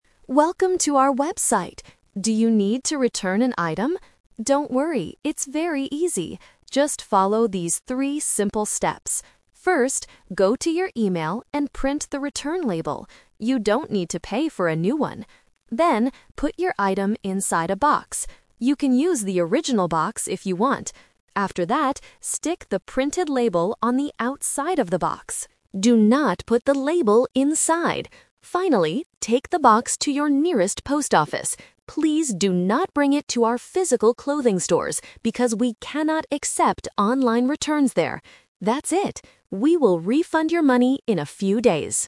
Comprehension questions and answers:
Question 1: What is the first step to return an item?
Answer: Print the return label from an email.

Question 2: Where should the customer put the return label?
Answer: On the outside of the box.

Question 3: Where does the customer need to take the box?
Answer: To a post office.

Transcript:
Video Host: Welcome to our website! Do you need to return an item? Don't worry, it's very easy. Just follow these three simple steps.
First, go to your email and print the return label. You don't need to pay for a new one.
Then, put your item inside a box. You can use the original box if you want. After that, stick the printed label on the outside of the box. Do not put the label inside!
Finally, take the box to your nearest post office. Please do not bring it to our physical clothing stores, because we cannot accept online returns there.
That's it! We will refund your money in a few days.